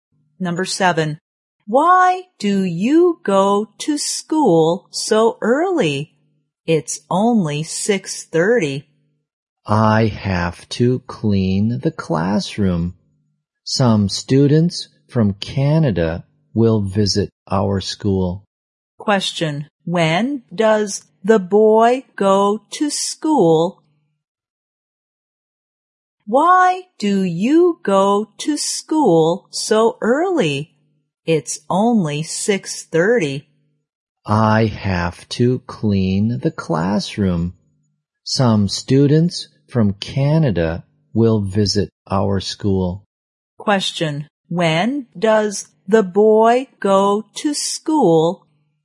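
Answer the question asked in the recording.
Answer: At 6:30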